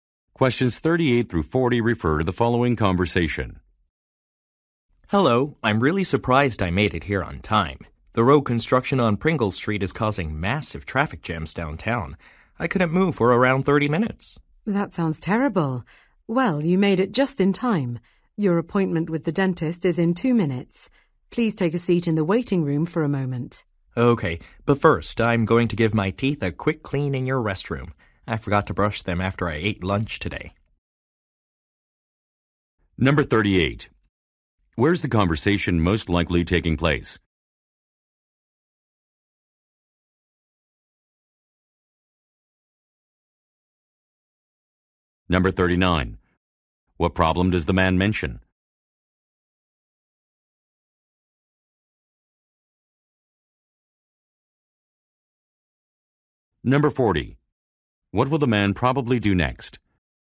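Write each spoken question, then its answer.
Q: Where's the conversation most likely taking place?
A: At a dental clinic

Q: What problem does the man mention?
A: Traffic jams caused by road construction

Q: What will the man probably do next?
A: Brush his teeth in the restroom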